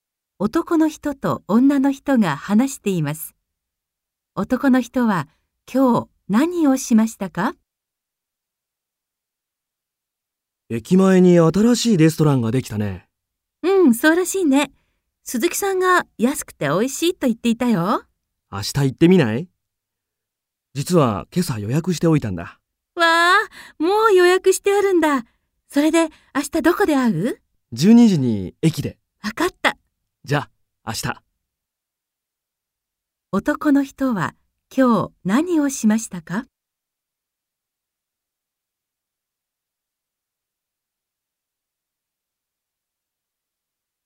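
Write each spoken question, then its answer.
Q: 男の人は今日何をしましたか?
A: レストランを予約した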